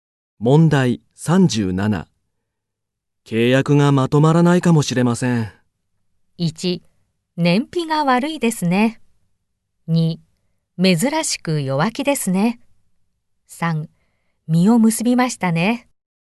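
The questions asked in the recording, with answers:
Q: 契約がまとまらないかもしれません。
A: 2: 珍しく弱気ですね。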